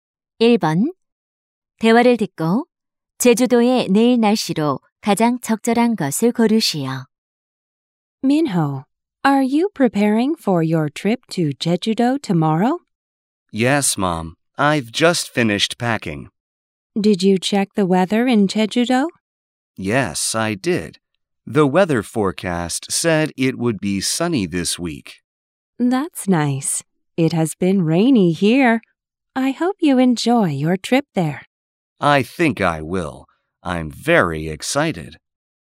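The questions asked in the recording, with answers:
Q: 대화를 듣고 제주도의 내일 날씨로 가장 적절한 것을 고르시오.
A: 맑음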